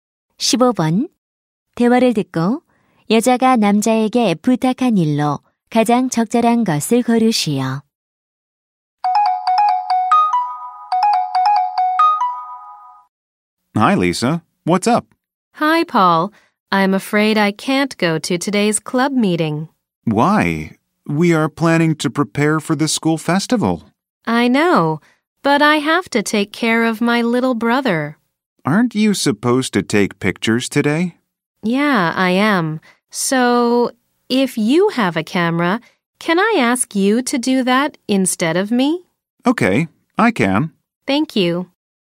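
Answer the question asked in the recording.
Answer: 대신 사진 찍기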